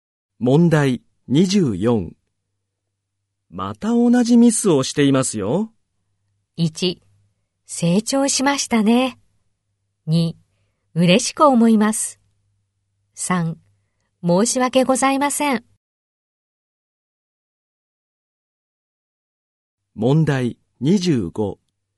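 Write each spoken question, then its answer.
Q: また同じミスをしていますよ。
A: 3: 申し訳ございません。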